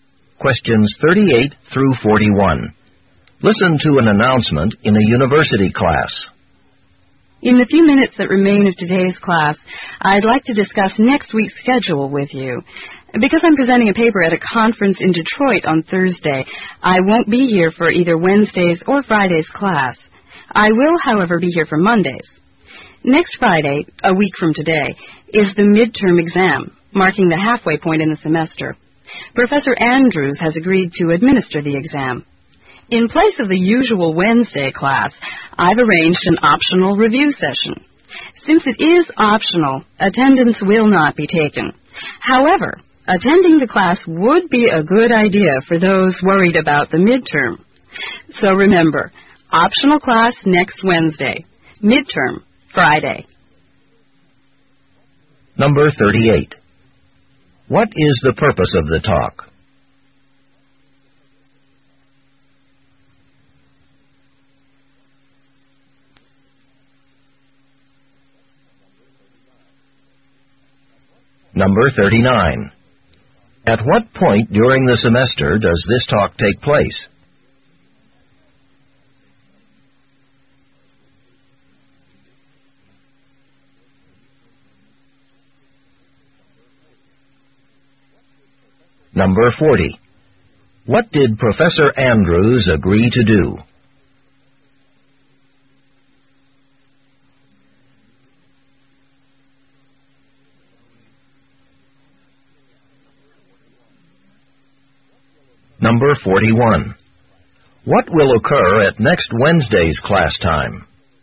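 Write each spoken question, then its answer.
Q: What is the purpose of the talk?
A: To discuss next week's class schedule

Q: At what point during the semester does this talk take place?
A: One week before the midterm, just before the halfway point

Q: What did Professor Andrews agree to do?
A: Administer the midterm exam

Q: What will occur at next Wednesday's class time?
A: An optional review session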